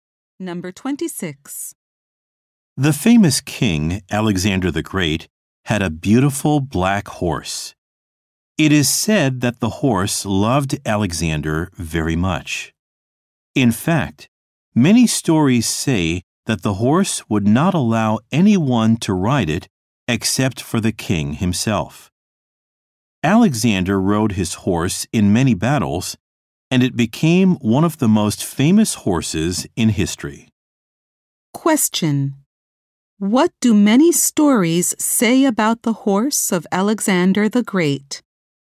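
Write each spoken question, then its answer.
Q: What do many stories say about the horse of Alexander the Great?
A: It let no one but the king ride it.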